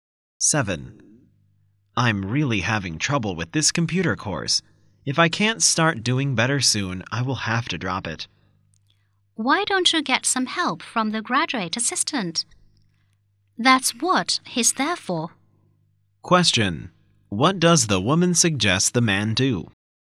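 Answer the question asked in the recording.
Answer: Get help from the graduate assistant.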